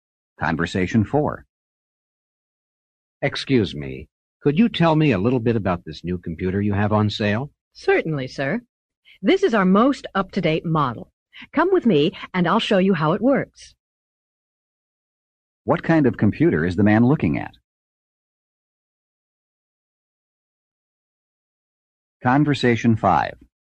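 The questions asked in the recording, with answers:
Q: What kind of computer is the man looking at?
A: The newest, most up-to-date model on sale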